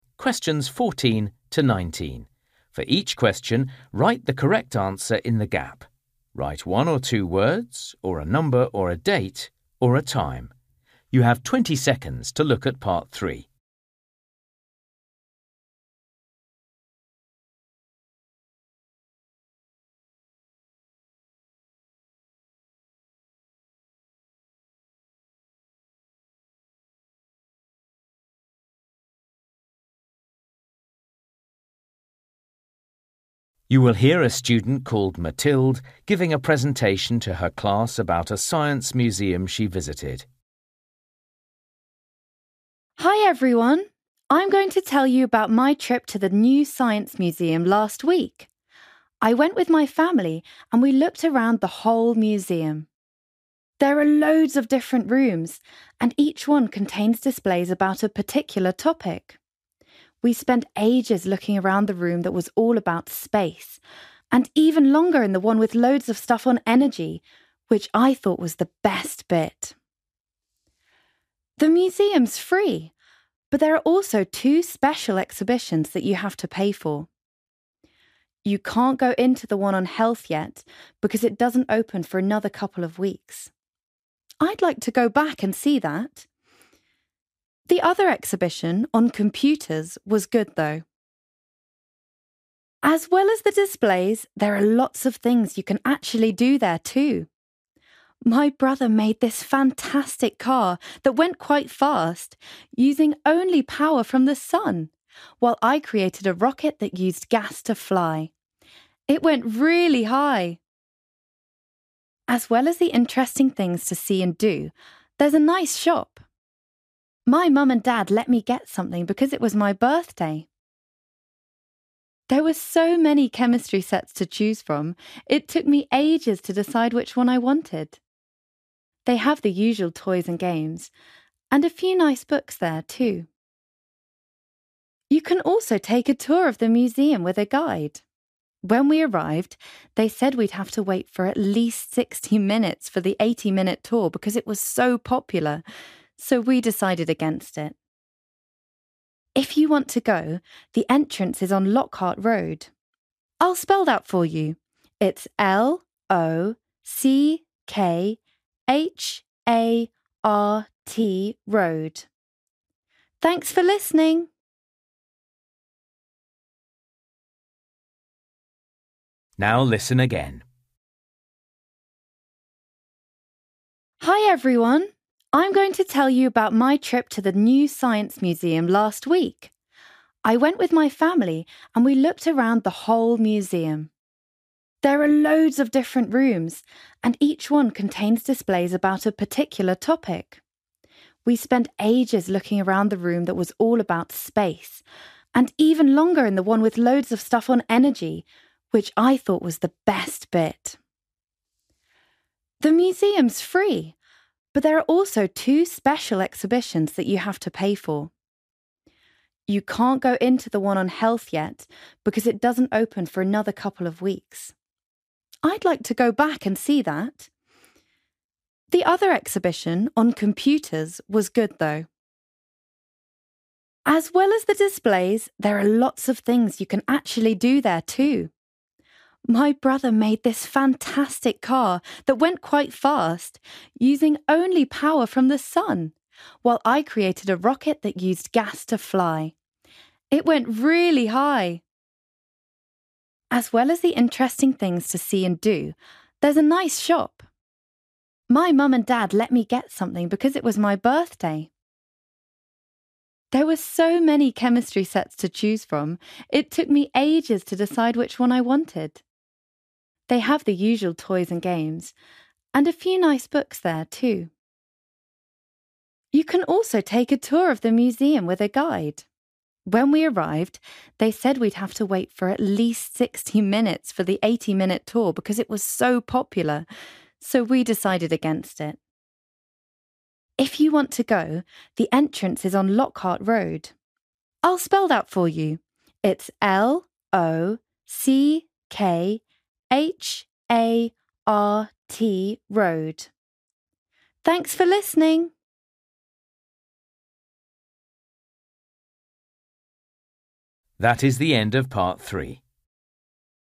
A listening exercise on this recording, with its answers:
For each question, write the correct answer in the gap. Write one or two words or a number or a date or a time.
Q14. Matilde's favourite room contained displays about (14) .................................... .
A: energy

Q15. The (15) .................................... exhibition is currently closed.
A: health

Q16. Matilde made a (16) .................................... at the museum.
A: rocket

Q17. The shop had a really good range of (17) .................................... .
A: chemistry sets

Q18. The guided tour lasts for (18) .................................... minutes.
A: 80 / eighty

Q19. Visitors must use the entrance on (19) .................................... Road.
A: L-O-C-K-H-A-R-T

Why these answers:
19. If you want to go, the entrance is on Lockhart Road. I'll spell that for you, it's L-O-C-K-H-A-R-T Road.

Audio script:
Hi everyone. I'm going to tell you about my trip to the new science museum last week. I went with my family and we looked around the whole museum. There are loads of different rooms and each one contains displays about a particular topic. We spent ages looking around the room that was all about space' and even longer in the one with loads of stuff on 'energy', which I thought was the best bit.
The museum's free, but there are also two special exhibitions that you have to pay for. You can't go into the one on 'health' yet because it doesn't open for another couple of weeks. I'd like to go back and see that. The other exhibition on 'computers' was good, though.
As well as the displays, there are lots of things you can actually do there too. My brother made this fantastic car that went quite fast, using only power from the sun, while I created a rocket that used gas to fly. It went really high!
As well as the interesting things to see and do, there's a nice shop. My mum and dad let me get something because it was my birthday. There were so many chemistry sets to choose from, it took me ages to decide which one I wanted. They have the usual toys and games, and a few nice books there, too.
You can also take a tour of the museum with a guide. When we arrived, they said we'd have to wait for at least sixty minutes for the eighty-minute tour because it was so popular, so we decided against it.
If you want to go, the entrance is on Lockhart Road. I'll spell that for you, it's L-O-C-K-H-A-R-T Road.
Thanks for listening.

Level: PET (B1)